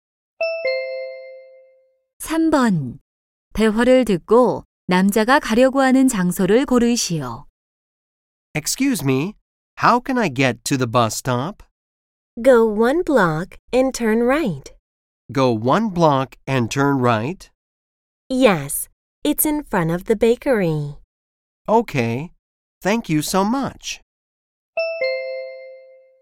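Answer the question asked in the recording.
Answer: 버스 정류장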